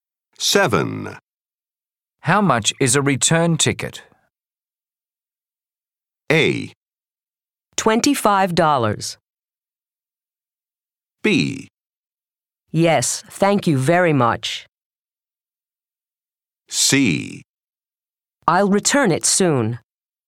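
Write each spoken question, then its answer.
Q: How much is a return ticket?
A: A: $25.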